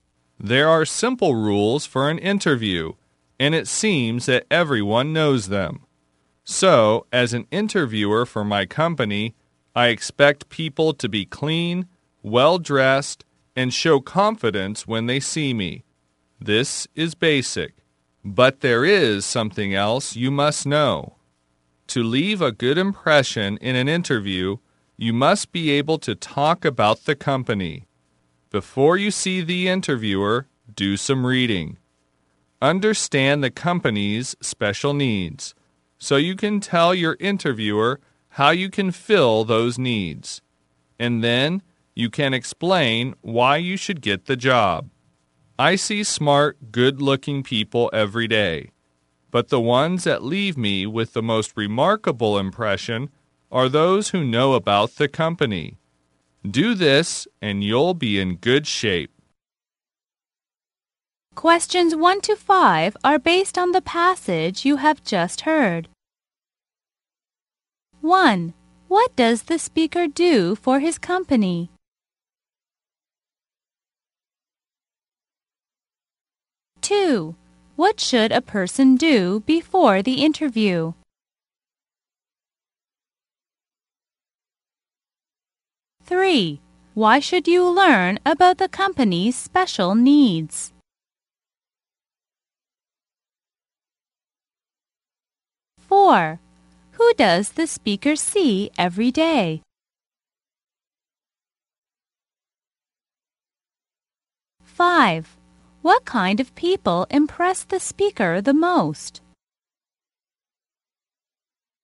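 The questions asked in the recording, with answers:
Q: What does the speaker do for his company?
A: He is an interviewer

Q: What should a person do before the interview?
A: Do some reading about the company

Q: Why should you learn about the company's special needs?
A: So you can tell the interviewer how you can fill those needs

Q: Who does the speaker see every day?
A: Smart, good-looking people

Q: What kind of people impress the speaker the most?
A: Those who know about the company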